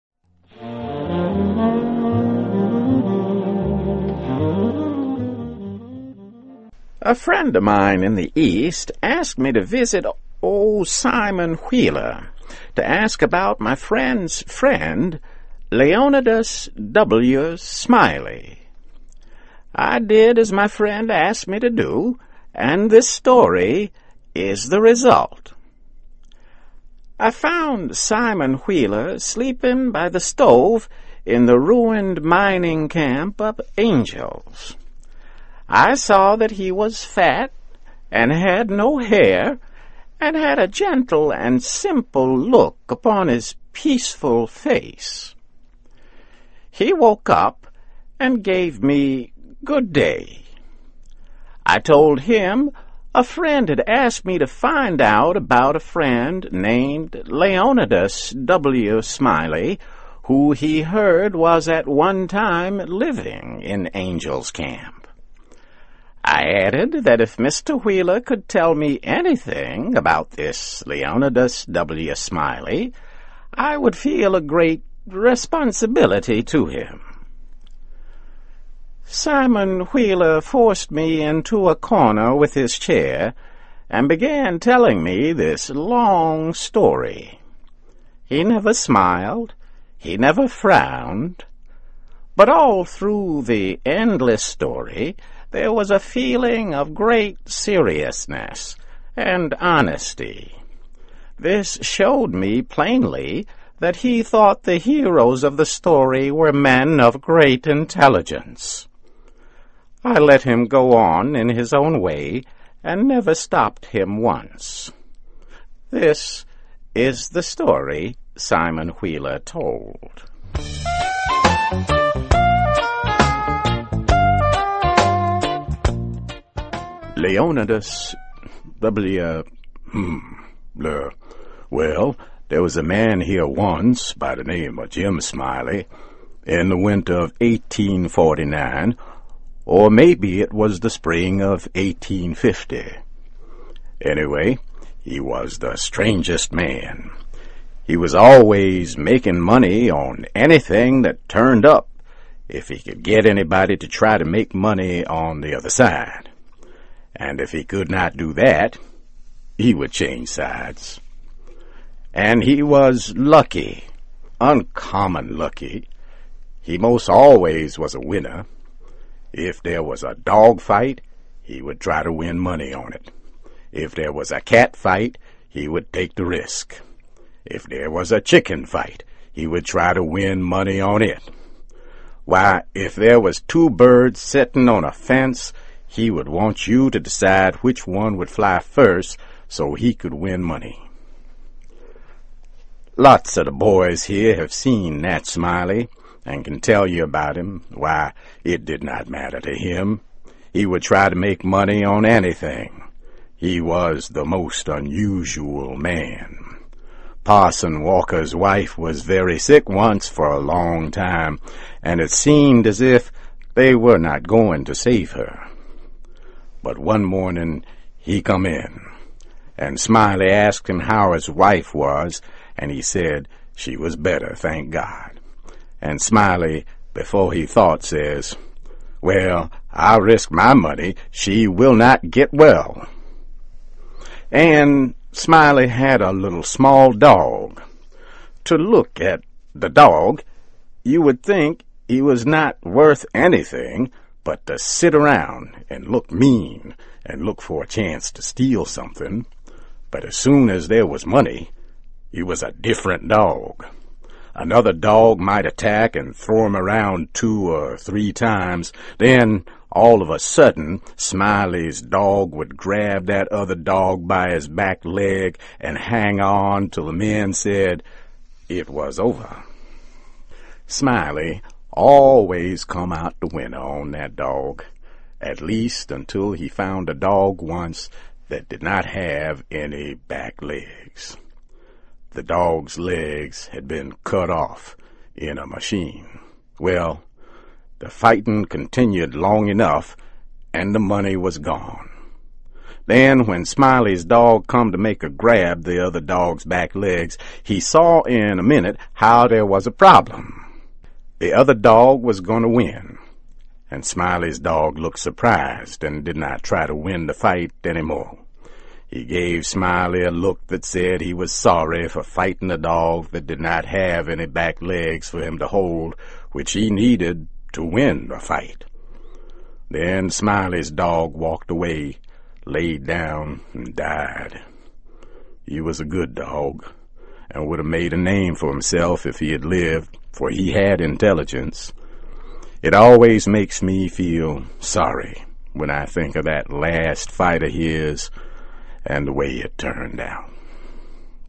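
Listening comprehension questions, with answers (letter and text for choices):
Listen carefully and for questions 1-10, choose the answer (A, B, C or D) which you think best completes each question.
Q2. What is Angel's Camp?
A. A summer camp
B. A church group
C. A mining town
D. A traveling fair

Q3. Who was fat and bald-headed?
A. Jim Smiley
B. Simon Wheeler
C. The Narrator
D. Dan'l Webster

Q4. What is Smiley's main characteristic?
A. Addicted to gambling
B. Addicted to life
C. Addicted to women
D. Addicted to sports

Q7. Jim Smiley enjoys...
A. Pizza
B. Wine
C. Vodka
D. Competition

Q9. On what does Jim like to bet?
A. Greyhound races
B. Random events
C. Horse races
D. Anything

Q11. How can the dog be described?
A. Feisty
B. Dull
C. Slow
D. Cute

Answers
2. C. A mining town
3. B. Simon Wheeler
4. A. Addicted to gambling
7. D. Competition
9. D. Anything
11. A. Feisty

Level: CAE - Certificate in Advanced English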